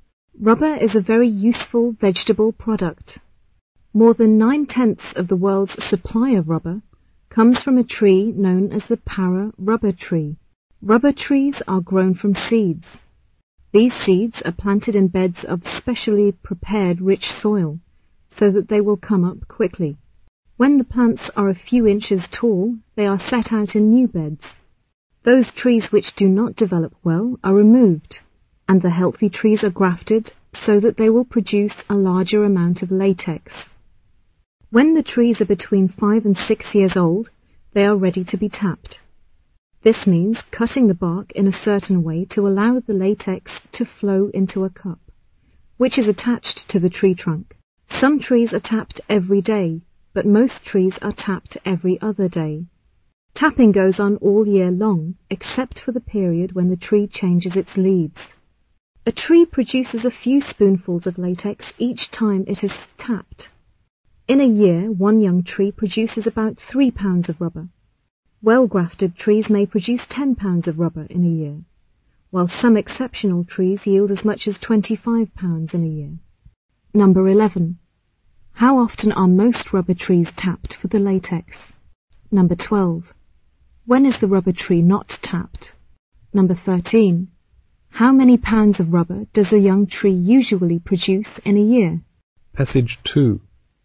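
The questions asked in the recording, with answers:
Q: How often are most rubber trees tapped for the latex?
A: Every other day

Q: When is the rubber tree not tapped?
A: When the tree changes its leaves

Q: How many pounds of rubber does a young tree usually produce in a year?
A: About 3 pounds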